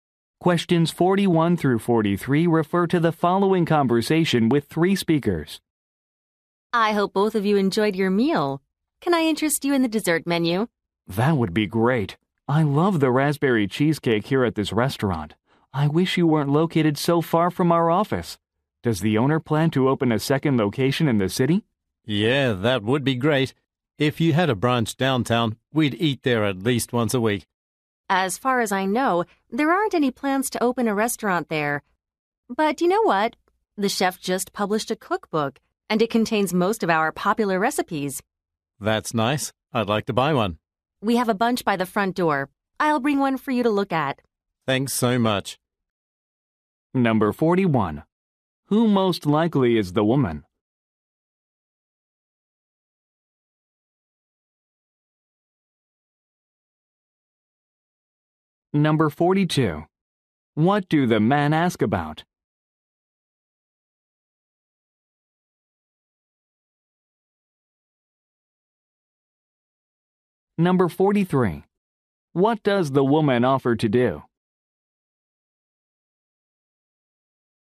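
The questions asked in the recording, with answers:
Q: Who most likely is the woman?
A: A restaurant server

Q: What do the men ask about?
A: A second restaurant location downtown

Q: What does the woman offer to do?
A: Bring a cookbook for them to look at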